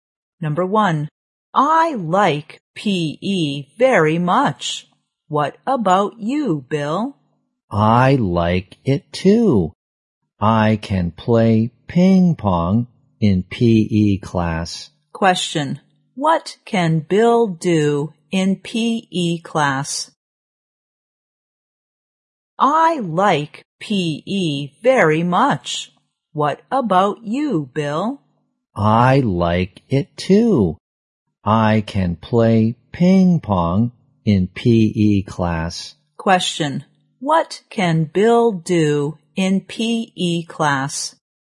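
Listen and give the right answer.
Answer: He can play ping pong.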